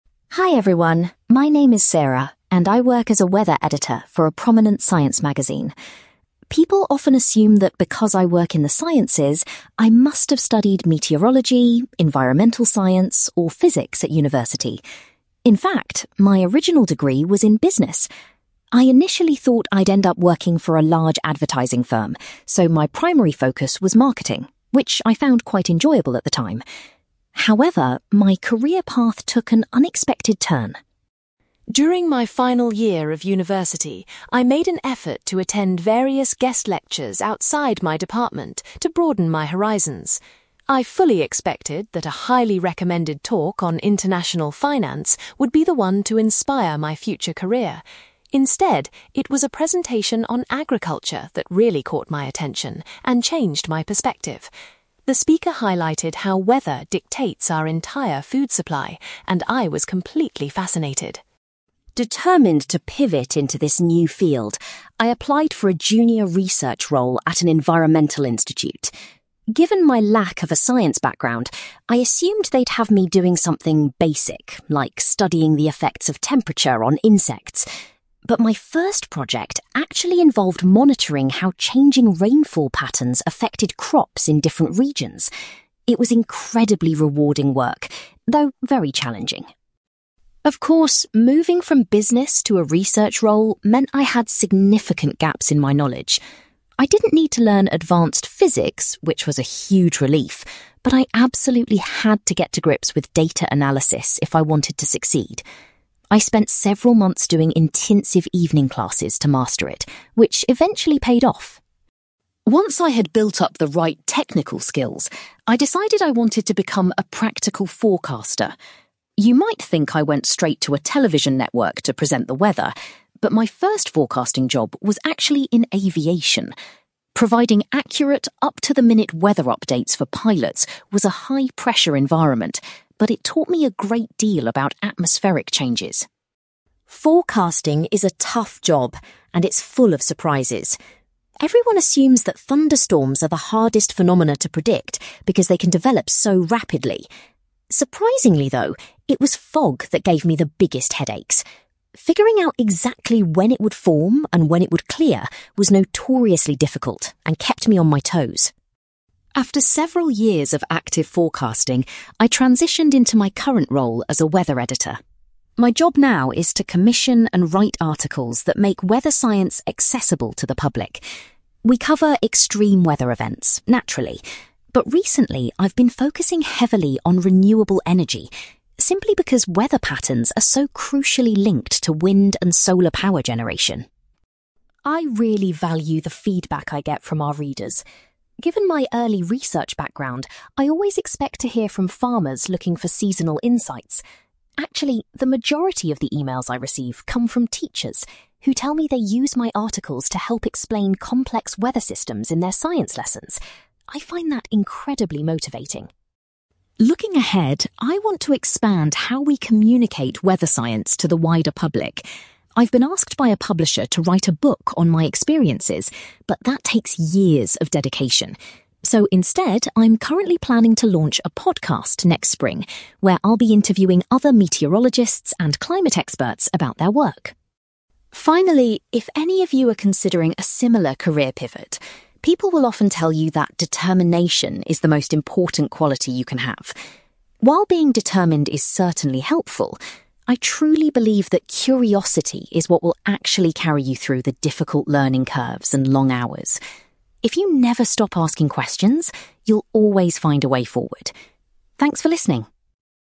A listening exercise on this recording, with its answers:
For questions 9-18, complete the sentences with a word or short phrase.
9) During her university business studies, Sarah chose to specialise in (9)........................... .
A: marketing

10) Sarah's career path changed after she attended a lecture about (10)........................... in her final year.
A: agriculture

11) In her first research job, Sarah looked into the way rainfall impacted (11)........................... .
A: crops

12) Sarah had to attend evening classes to develop her knowledge of (12)........................... .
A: data analysis

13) Sarah's first forecasting job involved working in (13)........................... .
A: aviation

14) Sarah discovered that forecasting (14)........................... caused her the most problems.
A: fog

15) As a weather editor, Sarah currently writes a lot about (15)........................... .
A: renewable energy

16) Sarah is pleased that many (16)........................... contact her about using her magazine articles.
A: teachers

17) Sarah's next project will be to create a (17)........................... about weather science.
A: podcast

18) According to Sarah, a strong sense of (18)........................... is essential for anyone changing careers.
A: curiosity

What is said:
Sarah: Hi everyone, my name is Sarah, and I work as a weather editor for a prominent science magazine. People often assume that because I work in the sciences, I must have studied meteorology, environmental science, or physics at university. In fact, my original degree was in business. I initially thought I'd end up working for a large advertising firm, so my primary focus was marketing, which I found quite enjoyable at the time. However, my career path took an unexpected turn.
During my final year of university, I made an effort to attend various guest lectures outside my department to broaden my horizons. I fully expected that a highly recommended talk on international finance would be the one to inspire my future career. Instead, it was a presentation on agriculture that really caught my attention and changed my perspective. The speaker highlighted how weather dictates our entire food supply, and I was completely fascinated.
Determined to pivot into this new field, I applied for a junior research role at an environmental institute. Given my lack of a science background, I assumed they'd have me doing something basic like studying the effects of temperature on insects. But my first project actually involved monitoring how changing rainfall patterns affected crops in different regions. It was incredibly rewarding work, though very challenging.
Of course, moving from business to a research role meant I had significant gaps in my knowledge. I didn't need to learn advanced physics, which was a huge relief, but I absolutely had to get to grips with data analysis if I wanted to succeed. I spent several months doing intensive evening classes to master it, which eventually paid off.
Once I had built up the right technical skills, I decided I wanted to become a practical forecaster. You might think I went straight to a television network to present the weather, but my first forecasting job was actually in aviation. Providing accurate, up-to-the-minute weather updates for pilots was a high-pressure environment, but it taught me a great deal about atmospheric changes.
Forecasting is a tough job, and it's full of surprises. Everyone assumes that thunderstorms are the hardest phenomena to predict because they can develop so rapidly. Surprisingly, though, it was fog that gave me the biggest headaches. Figuring out exactly when it would form and when it would clear was notoriously difficult and kept me on my toes.
After several years of active forecasting, I transitioned into my current role as a weather editor. My job now is to commission and write articles that make weather science accessible to the public. We cover extreme weather events, naturally, but recently I've been focusing heavily on renewable energy, simply because weather patterns are so crucially linked to wind and solar power generation.
I really value the feedback I get from our readers. Given my early research background, I always expect to hear from farmers looking for seasonal insights. Actually, the majority of the emails I receive come from teachers, who tell me they use my articles to help explain complex weather systems in their science lessons. I find that incredibly motivating.
Looking ahead, I want to expand how we communicate weather science to the wider public. I've been asked by a publisher to write a book on my experiences, but that takes years of dedication. So, instead, I'm currently planning to launch a podcast next spring, where I'll be interviewing other meteorologists and climate experts about their work.
Finally, if any of you are considering a similar career pivot, people will often tell you that determination is the most important quality you can have. While being determined is certainly helpful, I truly believe that curiosity is what will actually carry you through the difficult learning curves and long hours. If you never stop asking questions, you'll always find a way forward. Thanks for listening!

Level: B2